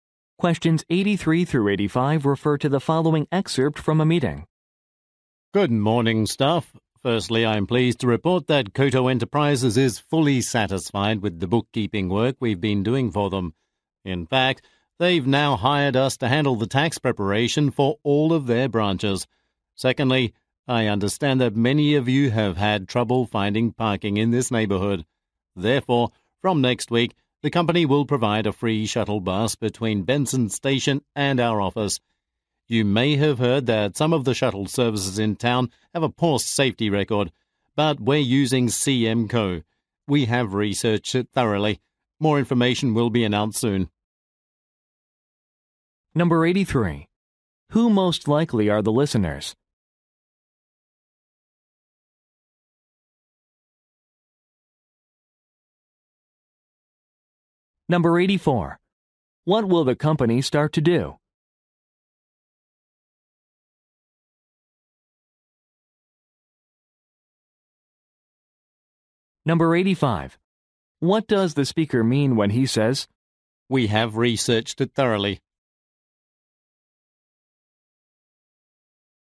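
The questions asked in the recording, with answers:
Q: Who most likely are the listeners?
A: Accountants

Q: What will the company start to do?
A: Provide a free shuttle bus

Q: "We have researched it thoroughly"?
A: The shuttle service is safe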